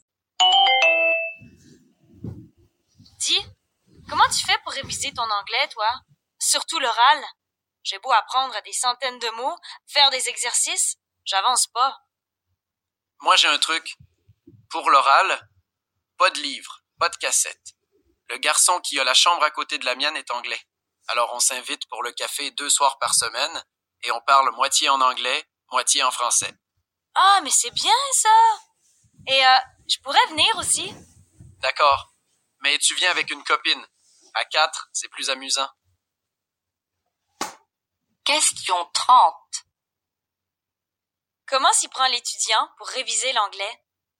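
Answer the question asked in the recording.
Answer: Il parle avec son voisin anglais deux soirs par semaine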